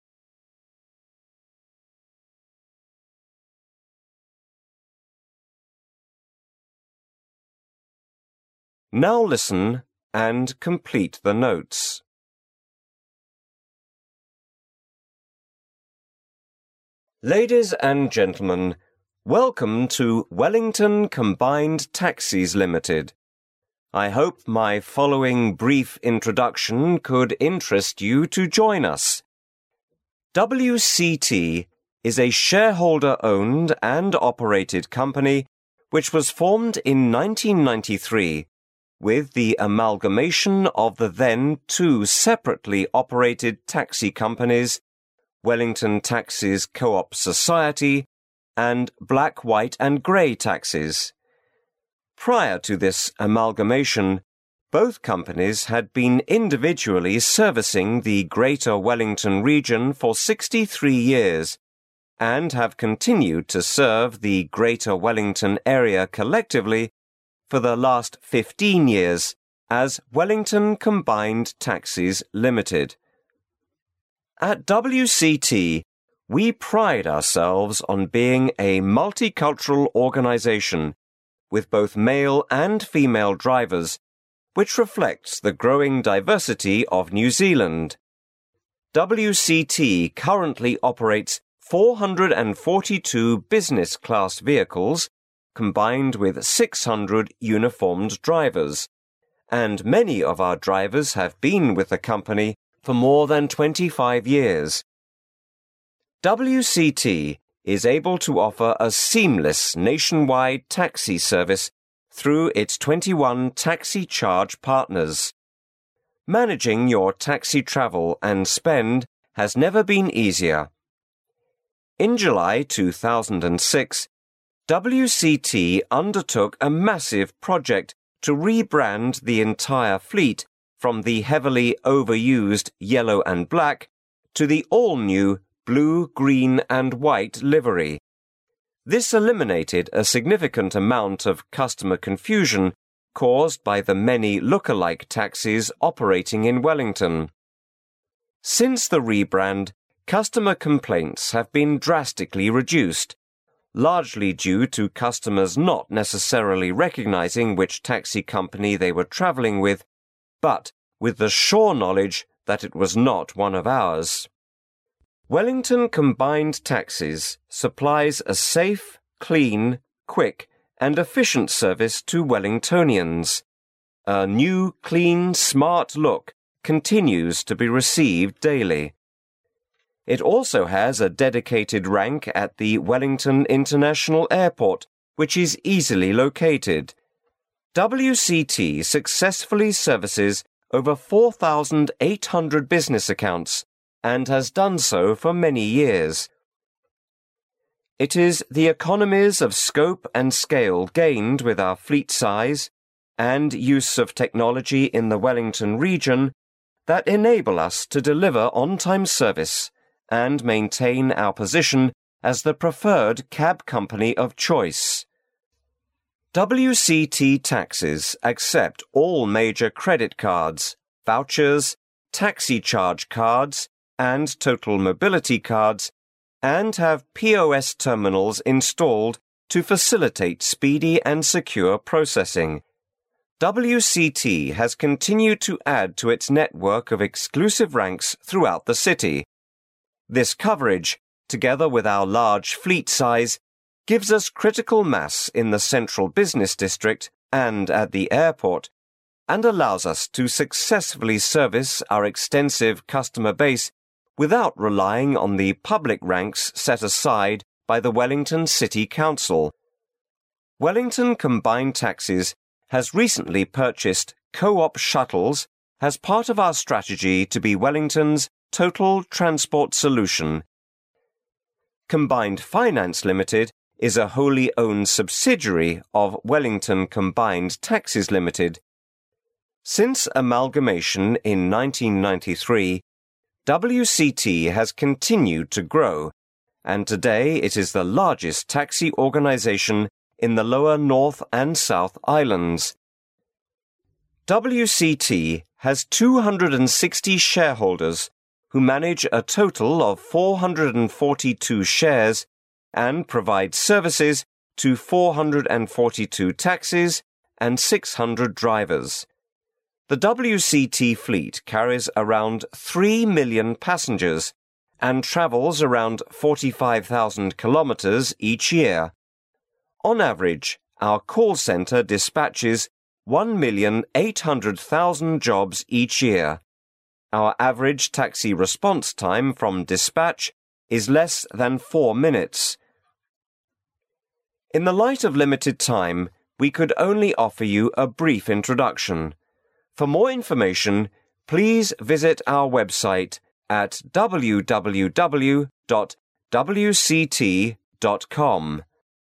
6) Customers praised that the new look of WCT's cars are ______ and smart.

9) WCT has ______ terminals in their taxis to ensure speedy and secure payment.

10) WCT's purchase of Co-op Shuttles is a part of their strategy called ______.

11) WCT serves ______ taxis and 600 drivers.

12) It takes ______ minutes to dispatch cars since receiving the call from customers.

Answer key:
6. new,clean
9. POS
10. Total Transport Solution
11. 442
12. less than 4

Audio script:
1993
[解析] 1-12 Man: Ladies and gentlemen, welcome to Wellington Combined Taxis Ltd. I hope my following brief introduction could interest you to join us. WCT, is a shareholder owned and operated company which was formed in 1993 with the amalgamation of the then two separately operated taxi companies—Wellington Taxis Coop Society and Black White & Grey Taxis. Prior to this amalgamation both companies had been individually servicing the Greater Wellington Region for 63 years and have continued to serve the Greater Wellington Area collectively for the least 15 years as Wellington Combined Taxis Ltd. At WCT we pride ourselves on being a multicultural organisation with both male and female drivers which reflects the growing diversity of New Zealand. WCT currently operates 442 Business Class vehicles combined with 600 uniformed drivers. And many of our drivers have been with the company for more than 25 years. WCT is able to offer a seamless nationwide taxi services through its 21 Taxi Charge partners. Managing your taxi travel and spend has never been easier. In July 2006 WCT undertook a massive project to re-brand the entire fleet from the heavily over used "Yellow and Black" to the all new "Blue, Green and White" livery. This eliminated a significant amount of customer confusion caused by the many look-a-like taxis operating in Wellington. Since the re-brand, customer complaints have been drastically reduced-largely due to customers not necessarily recognising which taxi company they were travelling with, but with the sure knowledge that it was not one of ours! Wellington Combined Taxis supplies a safe, clean, quick and efficient service to Wellingtonians, "new, clean, smart" look continue to be received daily. It also has a dedicated rank at the Wellington international Airport, which is easily located. WCT successfully services over 4800 business accounts and has done so for many years. It is the economies of scope and scale gained with our fleet size, and use of technology in the Wellington region that enables us to deliver on-time service and maintain our position as the preferred cab company of choice. WCT taxis accept all major credit cards, vouchers, TaxiCharge cards and Total Mobility cards and have POS terminals installed to facilitate speedy and secure processing. WCT has continued to add to its network of exclusive ranks throughout the city. This coverage. together with our large fleet size, gives us critical mass in the Central Business District and at the Airport—and allows us to successfully service our extensive customer base without relying on the public ranks set aside by the Wellington City Council. Wellington Combined Taxis has recently purchased Co-op Shuttles as part of our strategy to be Wellingtons "Total Transport Solution". Combined Finance Ltd is a wholly owned subsidiary of Wellington Combined Taxis Ltd. Since amalgamation in 1993, WCT has continued to grow and today it is the largest taxi organisation in the lower North and South Islands. WCT has 260 shareholders who manage a total of 442 shares and provides services to 442 taxis and 600 drivers. The WCT fleet carries around 3.000,000 passengers and travels around 45.000 kilometers each year. On average our Call Centre dispatches 1,800,000 jobs each year. Our average taxi response time from dispatch is less 4 minutes. In the light of limited time, we could only offer you brief introduction. For more information, please visit our website www. wct. com...